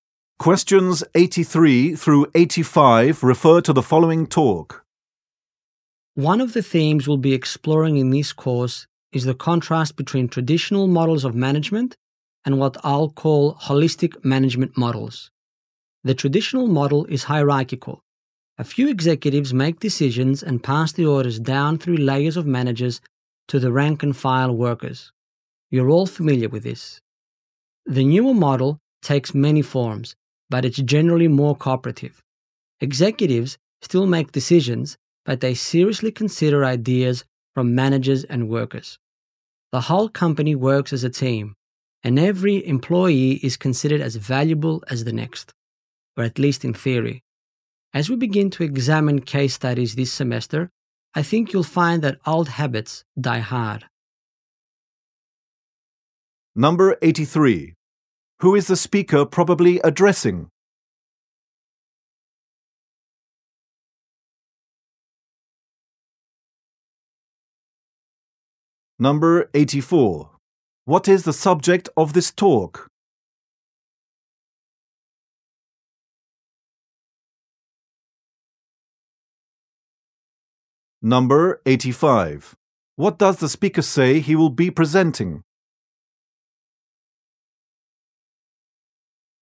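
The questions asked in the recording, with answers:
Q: Who is the speaker probably addressing?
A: Students in a course

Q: What is the subject of this talk?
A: Traditional versus holistic management models

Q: What does the speaker say he will be presenting?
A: Case studies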